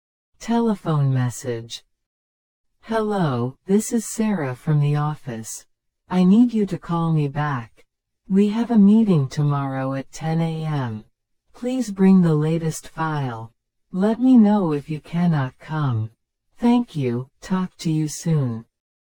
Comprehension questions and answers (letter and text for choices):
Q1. Who is the message from?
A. A woman from the office.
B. A customer.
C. The manager.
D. A friend.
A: A. A woman from the office.

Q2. When is the meeting?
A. Next week at noon.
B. At 10 tomorrow morning.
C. Today at 10AM.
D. Tomorrow at 2PM.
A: B. At 10 tomorrow morning.

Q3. What should the listener bring?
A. The latest file.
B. A contract.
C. Meeting notes.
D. A business card.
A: A. The latest file.

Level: 初級者用